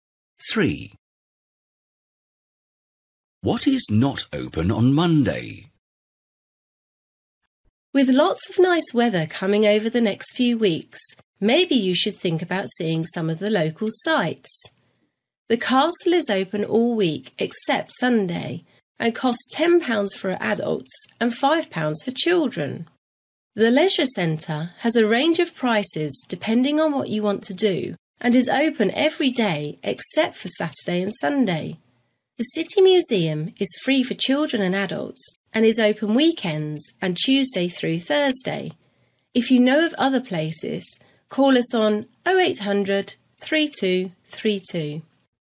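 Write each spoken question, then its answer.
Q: What is not open on Monday?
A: The City Museum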